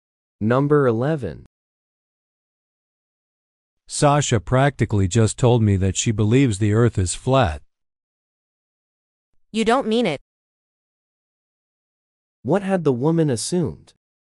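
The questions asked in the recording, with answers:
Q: What had the woman assumed?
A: That Sasha did not believe the earth is flat.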